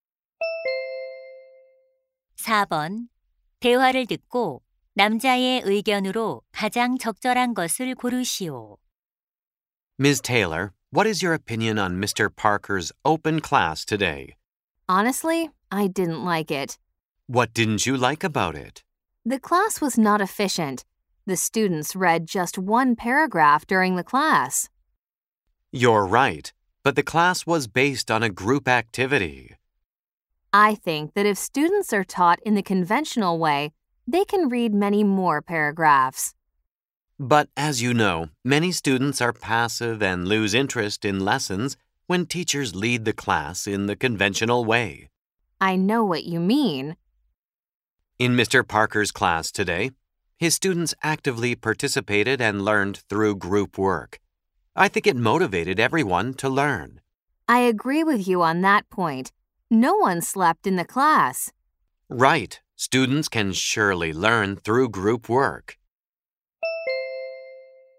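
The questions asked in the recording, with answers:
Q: 대화를 듣고 남자의 의견으로 가장 적절한 것을 고르시오.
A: 모둠 활동 수업이 학생들의 학습 동기를 높인다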